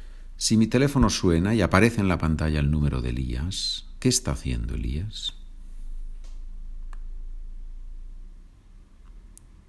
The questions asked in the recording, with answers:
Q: Si mi teléfono suena y aparece en la pantalla el número de Elías, ¿qué está haciendo Elías?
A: Elías me está llamando por teléfono.